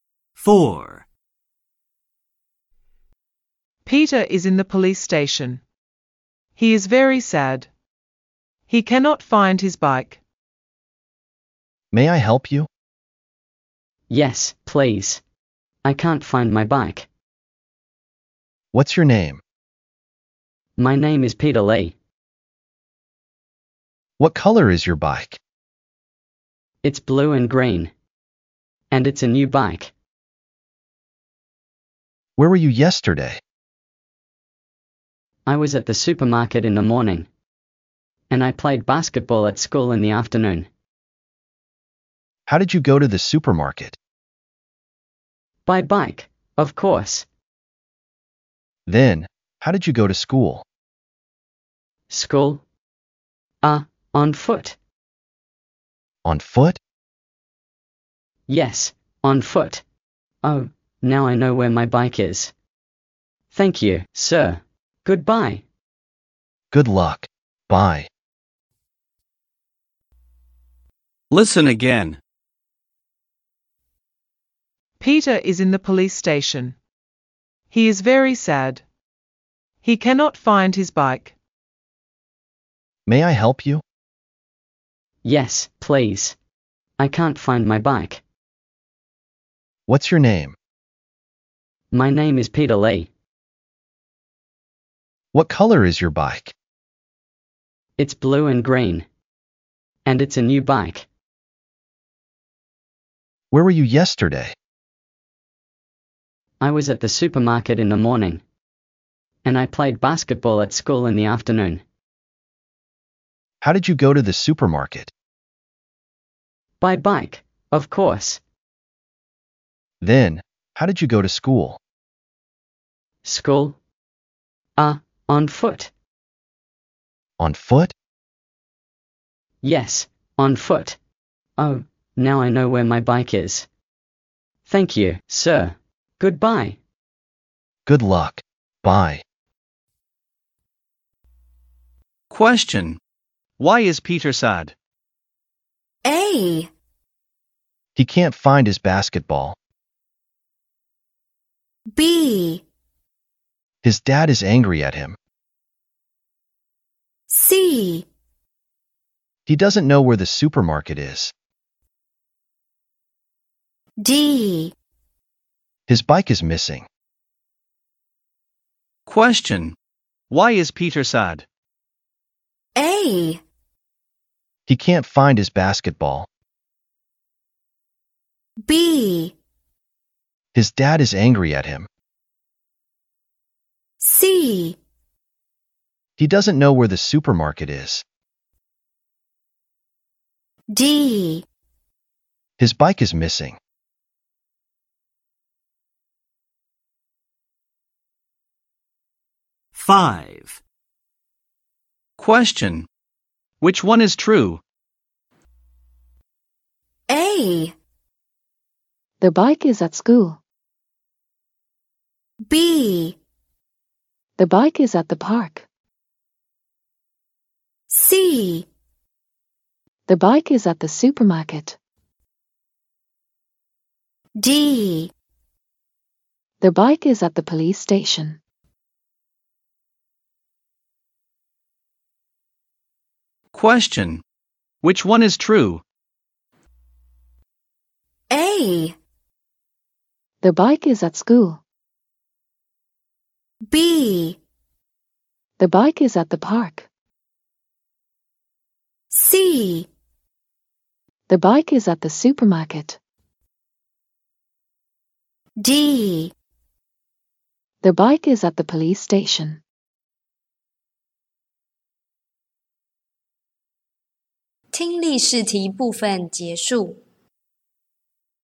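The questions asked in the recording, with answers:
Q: Question. Why is Peter sad?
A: D: His bike is missing.

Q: Question. Which one is true?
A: C: The bike is at the supermarket.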